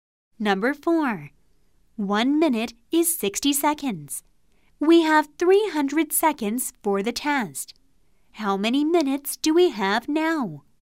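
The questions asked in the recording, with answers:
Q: How many minutes do we have now?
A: 5 minutes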